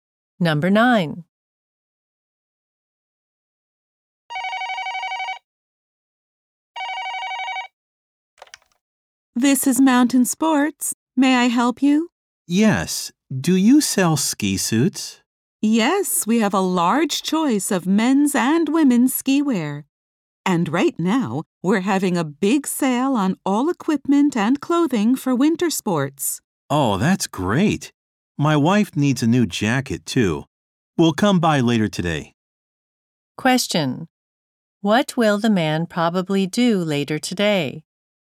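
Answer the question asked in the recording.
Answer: Go to the store to buy ski wear.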